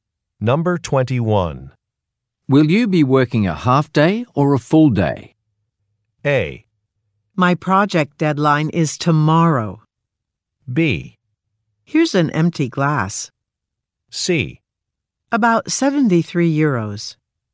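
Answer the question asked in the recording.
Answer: A: My project deadline is tomorrow.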